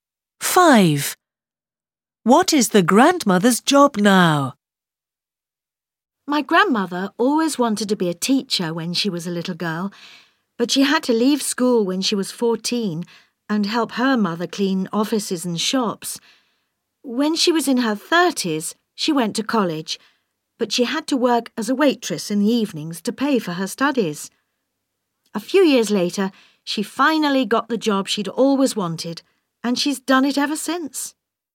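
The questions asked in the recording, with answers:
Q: Five. What is the grandmother's job now?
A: teacher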